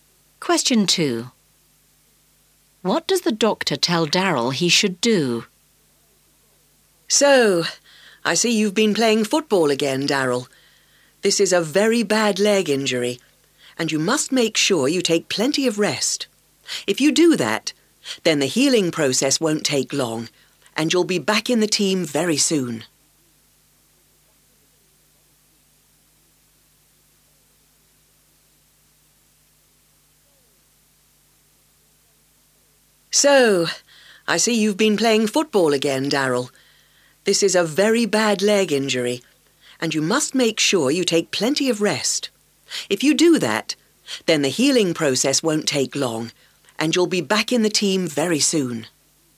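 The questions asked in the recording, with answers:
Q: What does the doctor tell Daryl he should do?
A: Take plenty of rest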